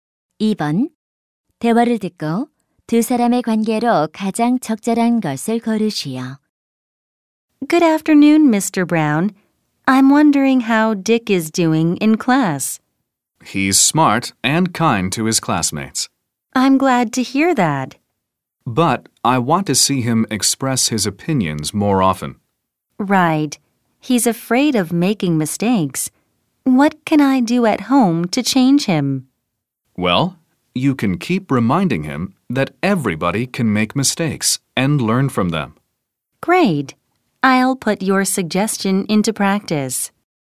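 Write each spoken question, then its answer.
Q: 대화를 듣고 두 사람의 관계로 가장 적절한 것을 고르시오.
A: 교사와 학부모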